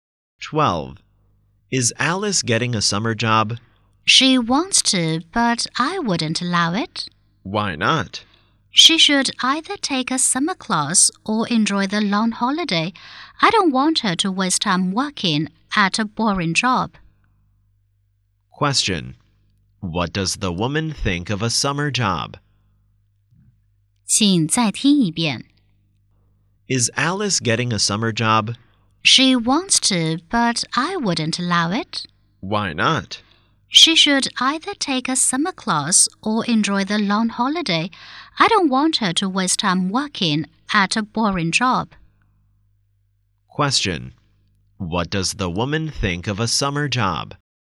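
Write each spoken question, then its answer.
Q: Question: What does the woman think of a summer job?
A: It is a waste of time; she thinks it's boring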